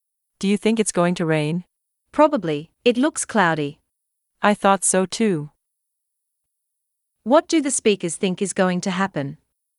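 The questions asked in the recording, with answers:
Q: What do the speakers think is going to happen?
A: It's going to rain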